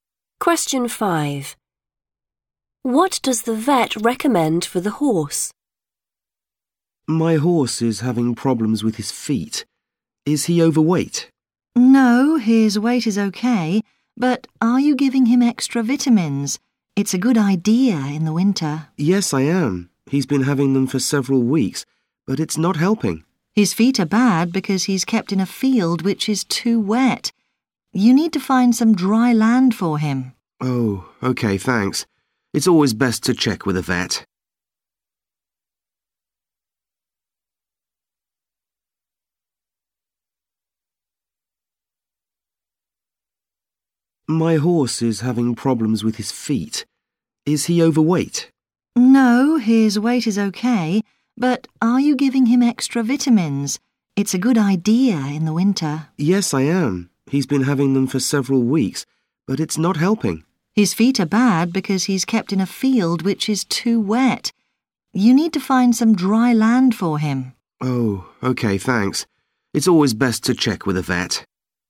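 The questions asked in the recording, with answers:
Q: What does the vet recommend for the horse?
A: Find some dry land for him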